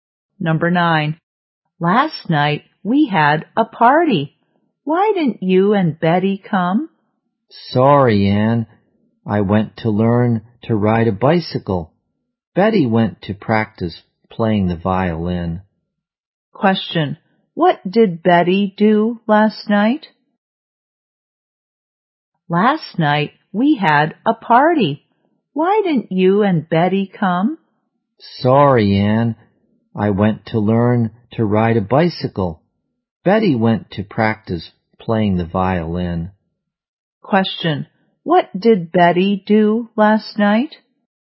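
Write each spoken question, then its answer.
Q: What did Betty do last night?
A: She practiced playing the violin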